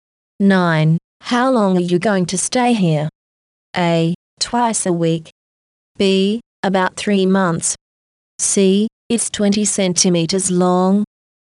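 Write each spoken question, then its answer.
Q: How long are you going to stay here?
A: B: About 3 months.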